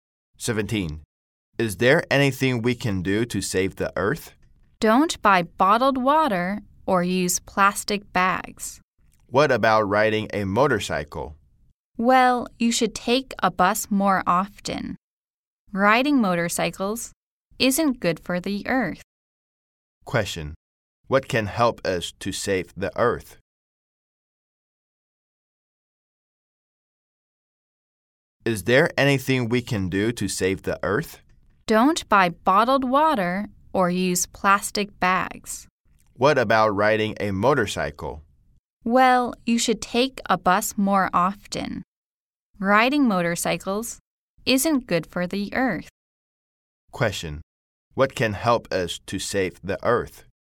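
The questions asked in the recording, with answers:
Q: What can help us to save the earth?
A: Not buying bottled water or using plastic bags, and taking the bus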